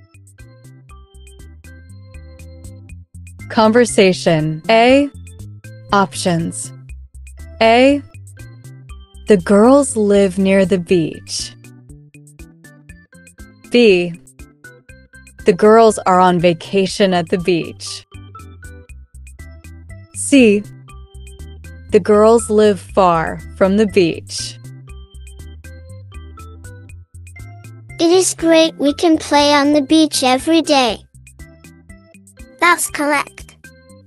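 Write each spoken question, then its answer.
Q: Conversation A.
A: B: The girls are on vacation at the beach.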